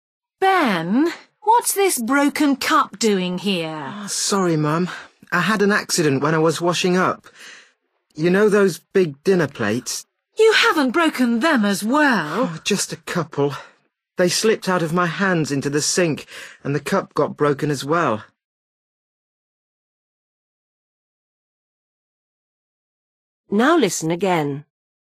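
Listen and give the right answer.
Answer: A cup and a couple of big dinner plates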